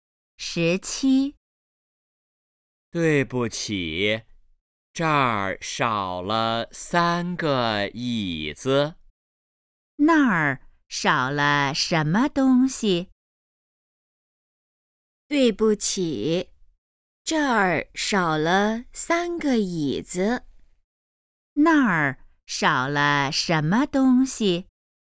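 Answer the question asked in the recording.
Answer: 三个椅子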